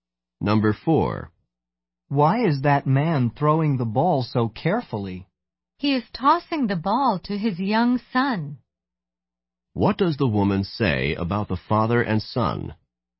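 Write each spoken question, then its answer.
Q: What does the woman say about the father and son?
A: The father is tossing the ball to his young son.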